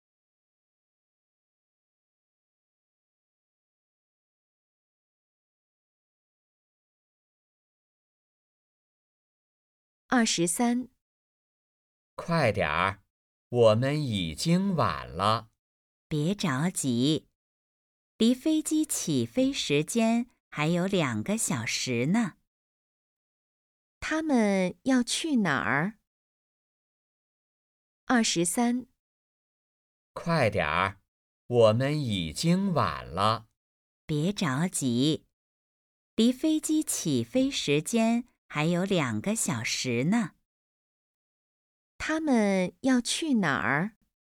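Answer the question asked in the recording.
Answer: 机场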